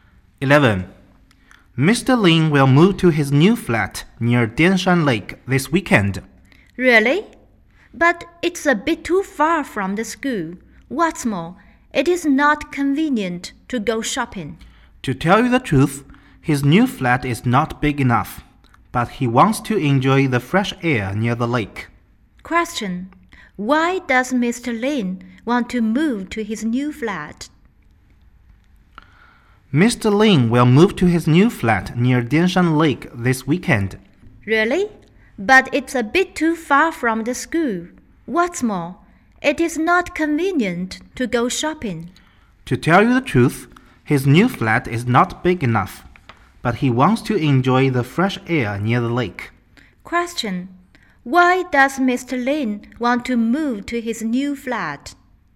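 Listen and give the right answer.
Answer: He wants to enjoy the fresh air near the lake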